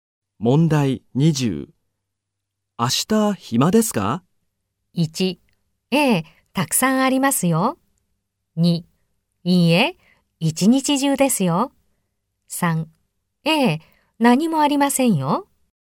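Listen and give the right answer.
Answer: 3: ええ、何もありませんよ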